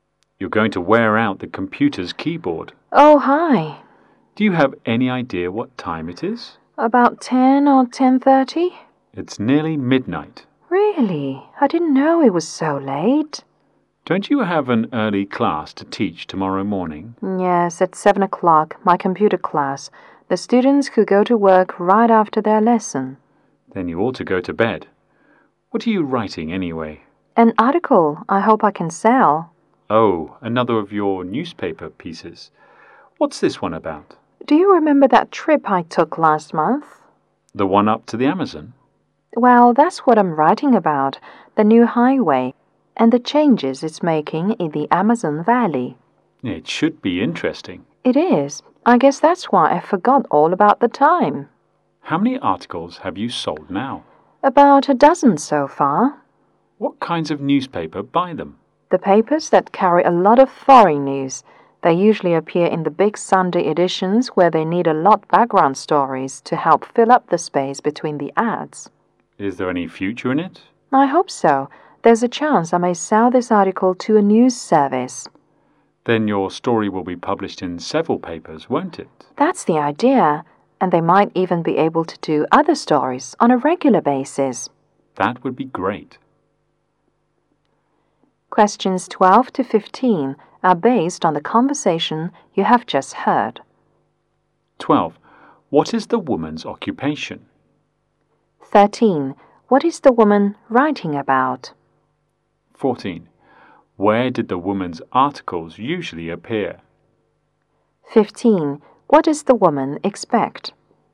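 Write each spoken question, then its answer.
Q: What is the woman writing about?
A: The new highway and the changes it is making in the Amazon Valley.

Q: Where did the woman's articles usually appear?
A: In the big Sunday editions of newspapers.

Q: What does the woman expect?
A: To sell her article to a news service.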